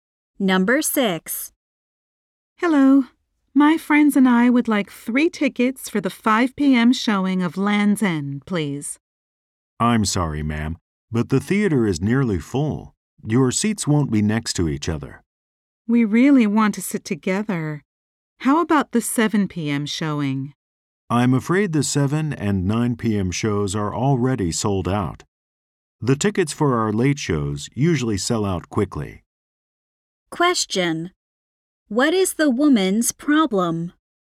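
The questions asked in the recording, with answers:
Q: What is the woman's problem?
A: She and her friends cannot get seats together.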